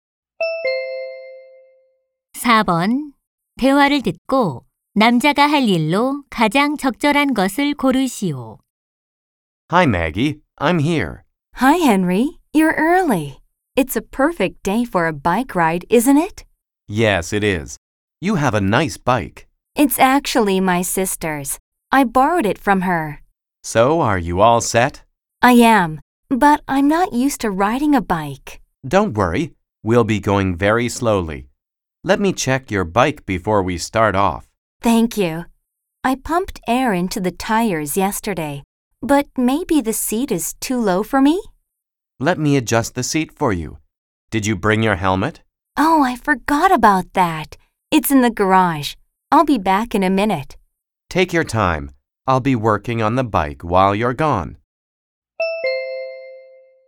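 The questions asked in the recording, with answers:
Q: 대화를 듣고 남자가 할 일로 가장 적절한 것을 고르시오.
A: 자전거 안장 높이 조절하기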